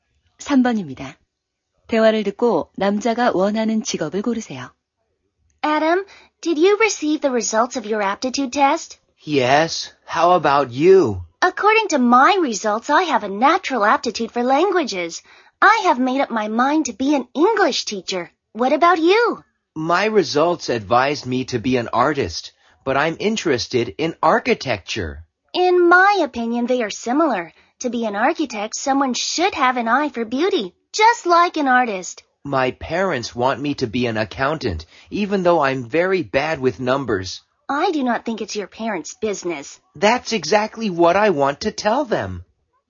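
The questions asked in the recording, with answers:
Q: 대화를 듣고 남자가 원하는 직업을 고르세요.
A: 건축가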